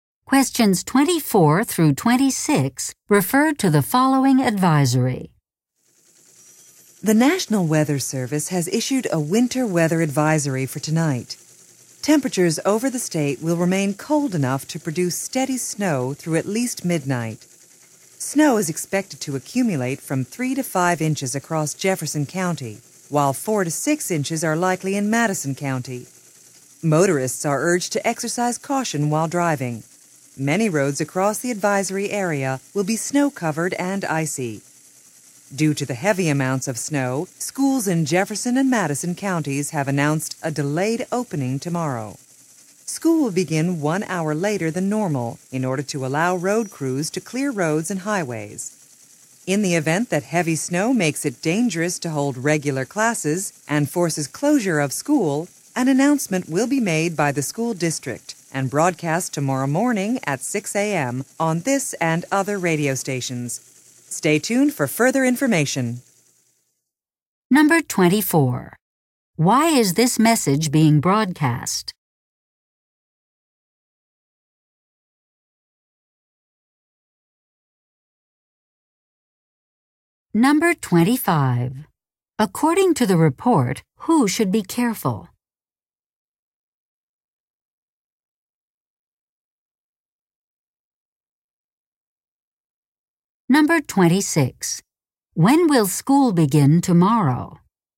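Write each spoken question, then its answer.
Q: Why is this message being broadcast?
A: To warn of a winter weather advisory (snow)

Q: According to the report, who should be careful?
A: Motorists

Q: When will school begin tomorrow?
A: 1 hour later than normal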